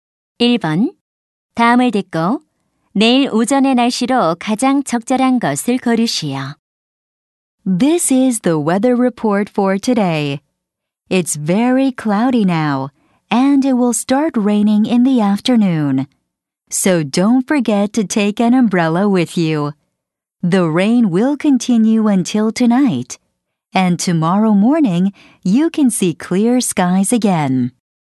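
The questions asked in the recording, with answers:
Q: 다음을 듣고 내일 오전의 날씨로 가장 적절한 것을 고르시오.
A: 맑음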